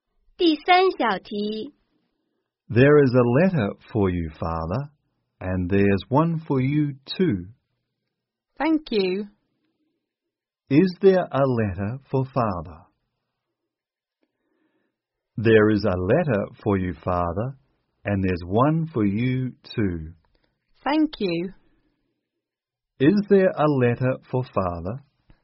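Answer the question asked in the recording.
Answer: Yes, there is.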